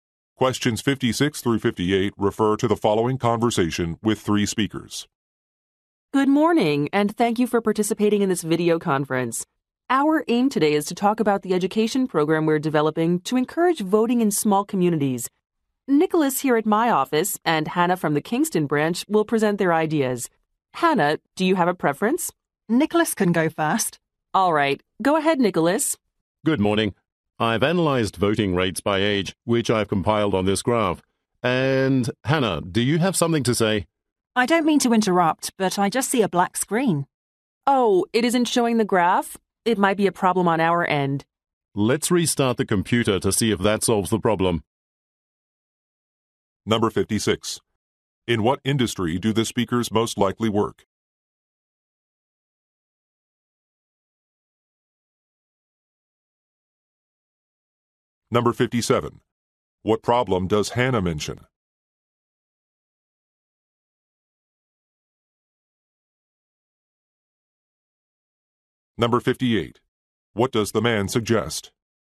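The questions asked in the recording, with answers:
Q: What problem does Hannah mention?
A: She sees only a black screen

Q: What does the man suggest?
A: Restarting the computer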